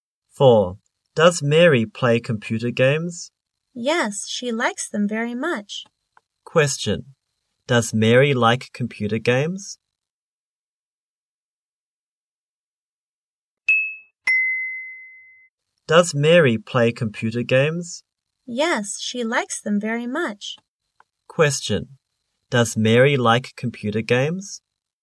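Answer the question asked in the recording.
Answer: Yes, she does.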